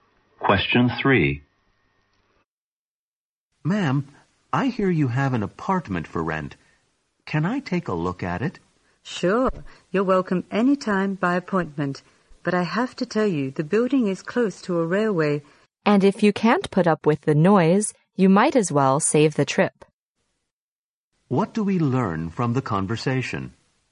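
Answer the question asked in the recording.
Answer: The apartment may be noisy because it is close to a railway.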